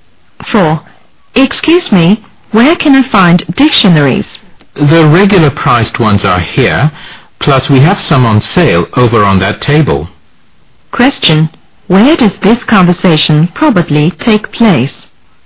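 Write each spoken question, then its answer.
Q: Where does this conversation probably take place?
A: In a bookstore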